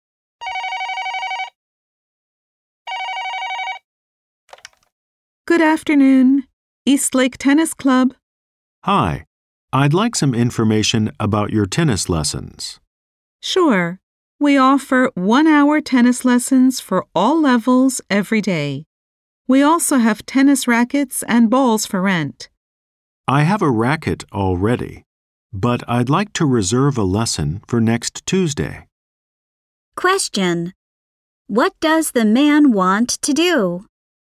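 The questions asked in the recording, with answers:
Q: Question: What does the man want to do?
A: Reserve a tennis lesson for next Tuesday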